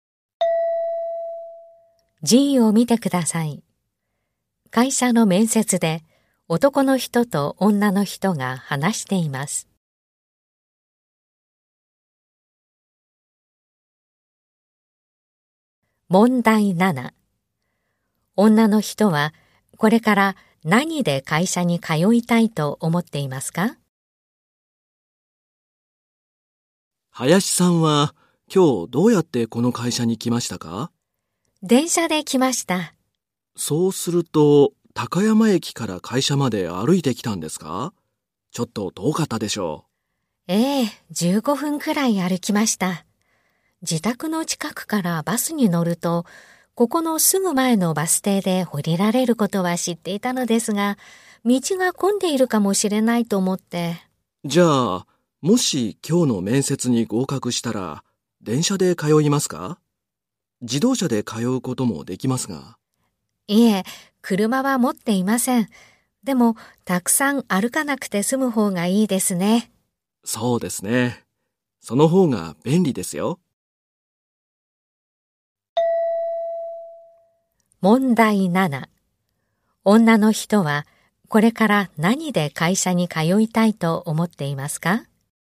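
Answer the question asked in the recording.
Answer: バス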